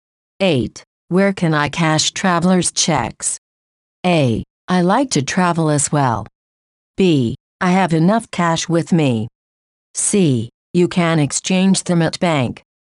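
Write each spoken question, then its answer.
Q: Where can I cash traveler's checks?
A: C: You can exchange them at bank.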